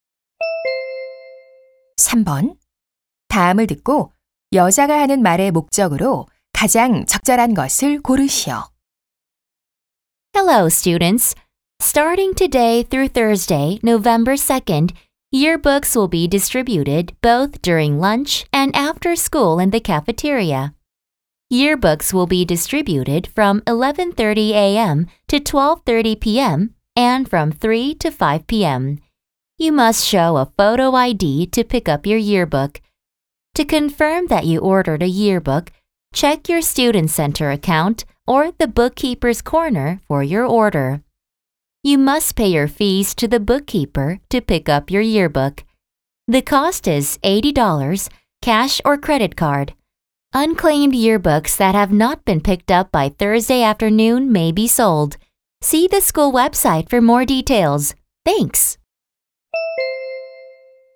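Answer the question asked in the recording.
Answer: 졸업 앨범 배부 일정과 수령 방법을 안내하려고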